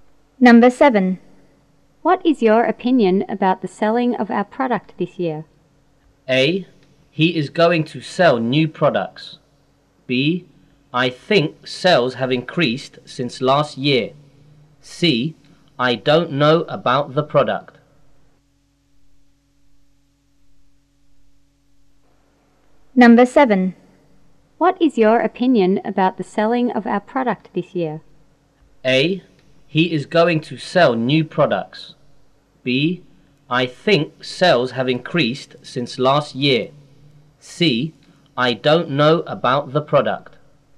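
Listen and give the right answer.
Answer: B: I think sales have increased since last year.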